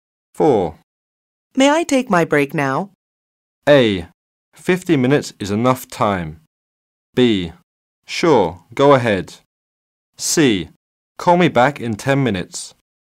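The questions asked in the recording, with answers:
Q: May I take my break now?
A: B: Sure, go ahead.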